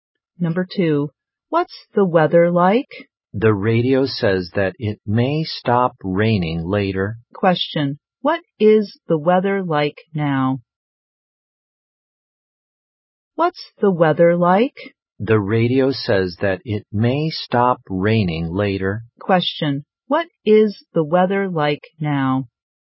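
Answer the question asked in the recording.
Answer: It's raining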